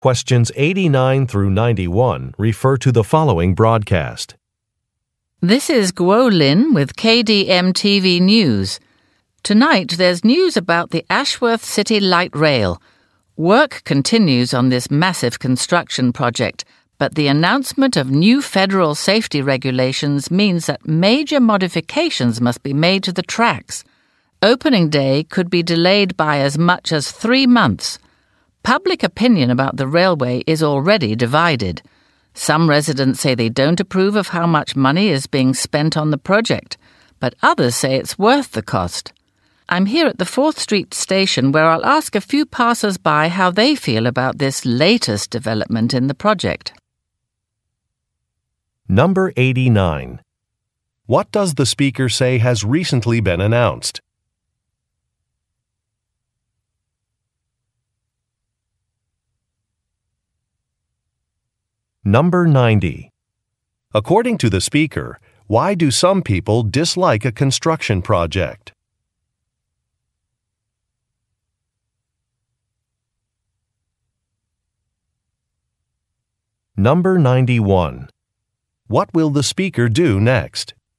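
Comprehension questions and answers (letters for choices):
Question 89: What does the speaker say has recently been announced?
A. An increase in funding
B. A factory opening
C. A new venue for an event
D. A change in regulations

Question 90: According to the speaker, why do some people dislike a construction project?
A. Because it caused a power outage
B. Because it costs too much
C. Because roads have been closed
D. Because of the loud noise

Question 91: What will the speaker do next?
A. Introduce an advertiser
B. Attend a press conference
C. Interview some people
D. End a broadcast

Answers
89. D
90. B
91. C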